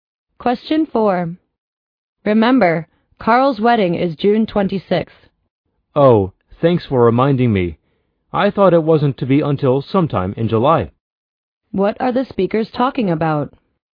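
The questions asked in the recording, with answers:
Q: What are the speakers talking about?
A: The date of Carl's wedding.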